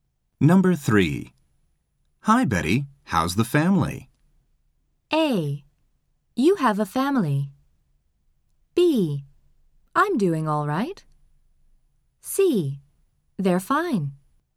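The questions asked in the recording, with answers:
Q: Hi, Betty. How's the family?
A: C: They're fine.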